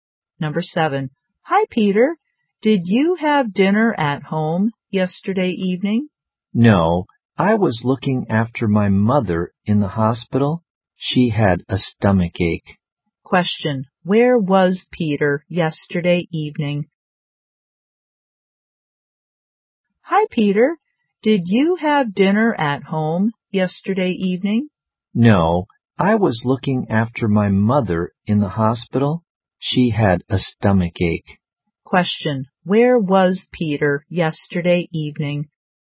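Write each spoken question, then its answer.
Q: Where was Peter yesterday evening?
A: In the hospital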